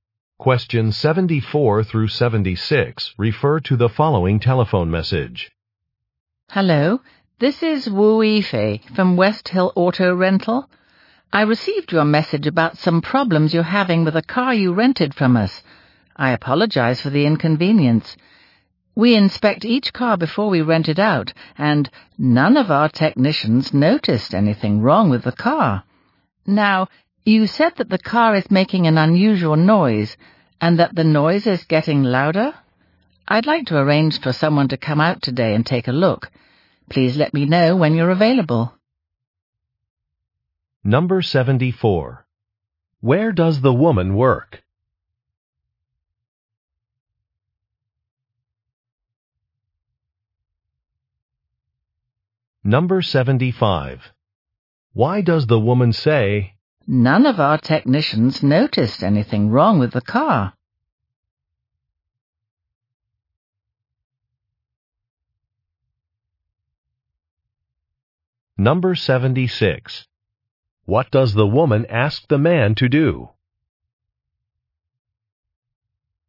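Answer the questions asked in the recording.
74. At a car rental company
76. Tell her when he is available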